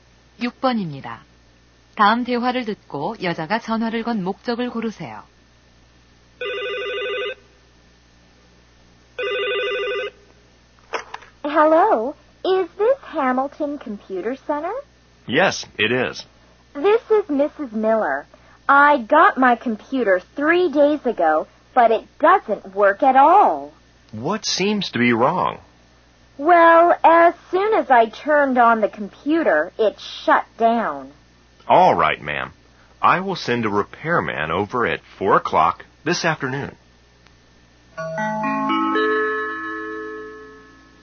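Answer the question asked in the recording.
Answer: 컴퓨터 수리 요청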